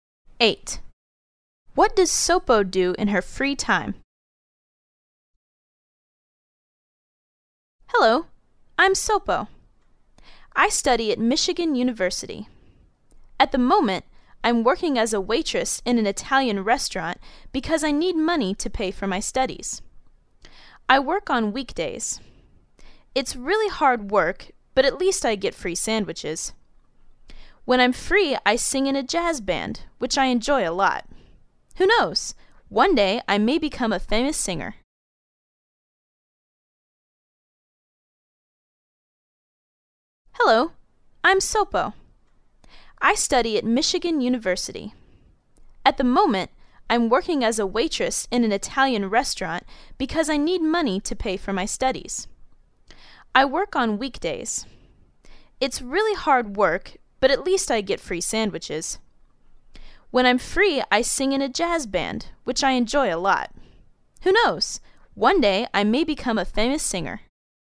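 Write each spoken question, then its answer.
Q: What does Sopo do in her free time?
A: She sings in a jazz band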